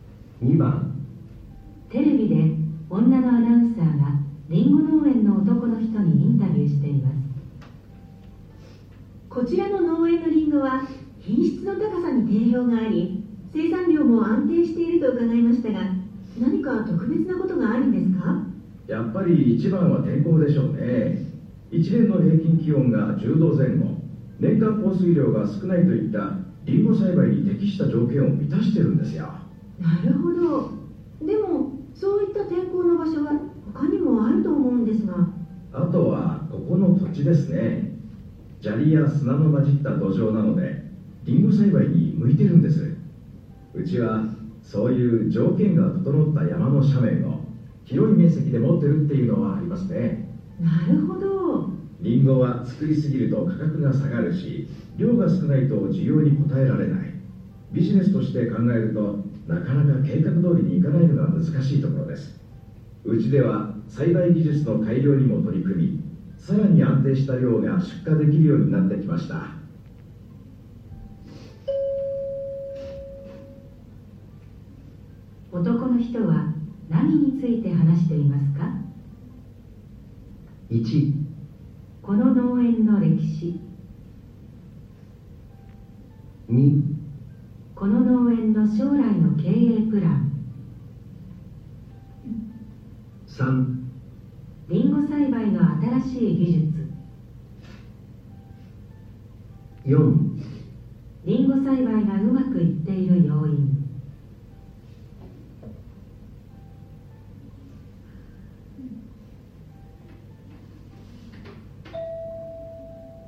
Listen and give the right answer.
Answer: 4

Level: N1 Listening · Test 1